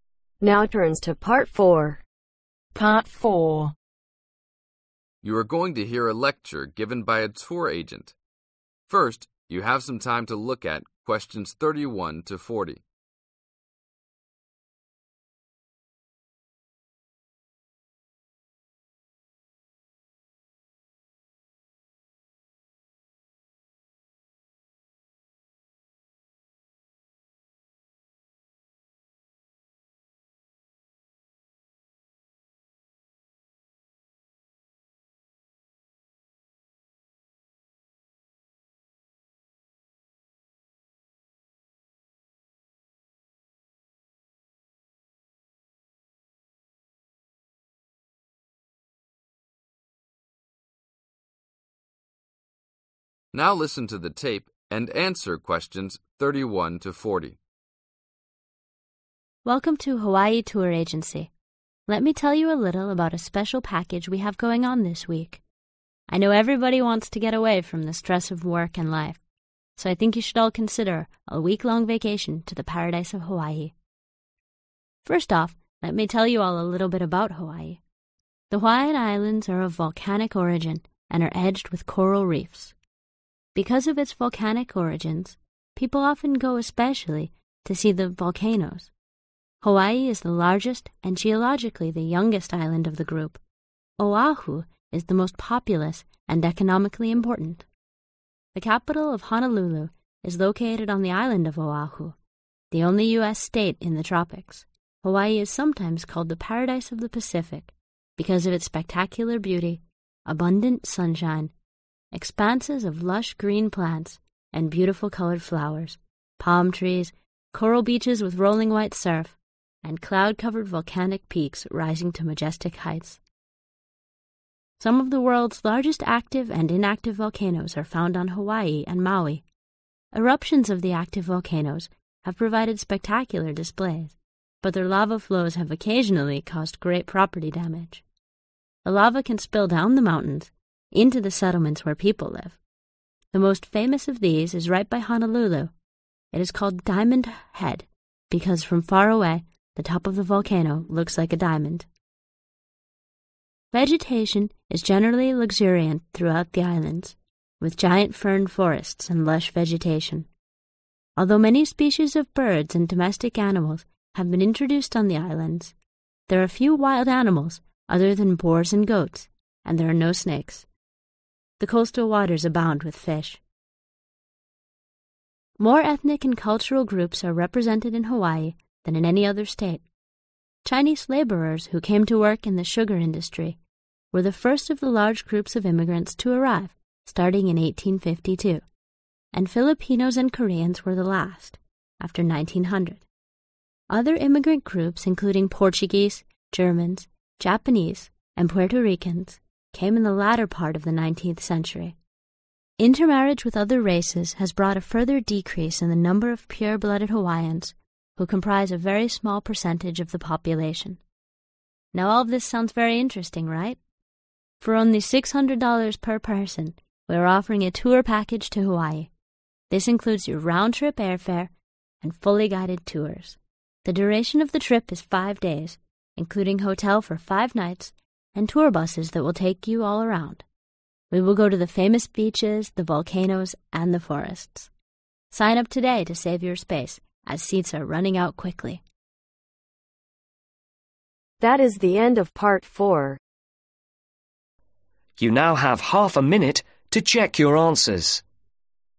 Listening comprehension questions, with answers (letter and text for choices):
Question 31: How were the Hawaiian islands originally formed ?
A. from the ocean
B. from volcanoes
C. from mountains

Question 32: Which island is the most populous and economically important ?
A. Hawaii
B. Honolulu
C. Oahu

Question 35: How do volcanoes damage property ?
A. The heat burns up houses.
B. The lava runs down into the cities.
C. The earthquake rattles the cities.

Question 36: What is the name of the most famous volcano ?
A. Diamond Head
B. Dreamer Head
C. Dollar Head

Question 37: Who were the first group of immigrants to arrive ?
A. the Japanese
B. the Chinese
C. the Filipinos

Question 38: (38) ............ per person,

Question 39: (39) ............ days,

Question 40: famous (40) ............ . volcanoes and the forests.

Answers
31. B. from volcanoes
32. C. Oahu
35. B. The lava runs down into the cities.
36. A. Diamond Head
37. B. the Chinese
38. $600
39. 5
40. beaches